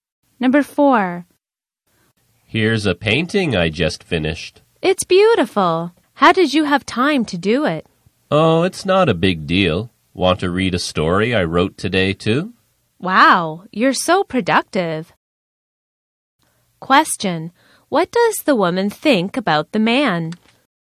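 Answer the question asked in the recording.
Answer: He is very productive.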